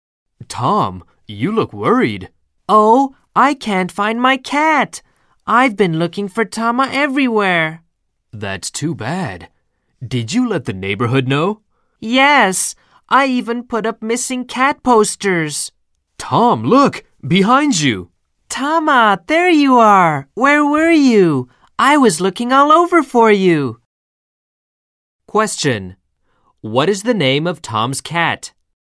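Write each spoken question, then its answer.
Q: What is the name of Tom's cat?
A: Tama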